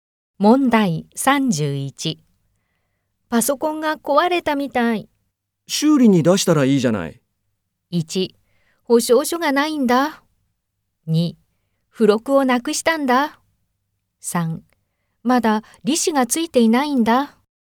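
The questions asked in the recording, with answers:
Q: 修理に出したらいいじゃない。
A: 1: 保証書がないんだ。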